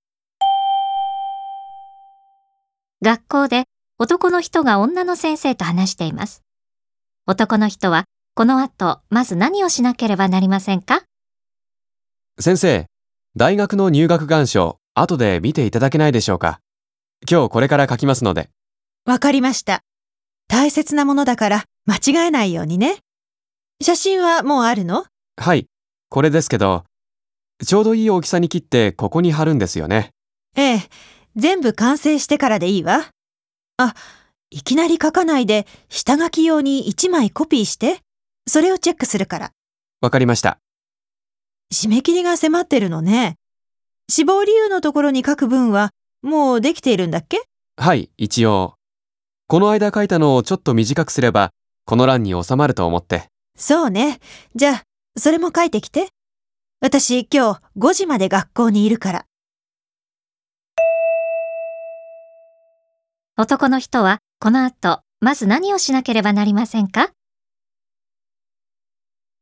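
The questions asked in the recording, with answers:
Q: 男の人はこの後まず何をしなければなりませんか?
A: 入学願書を1枚コピーする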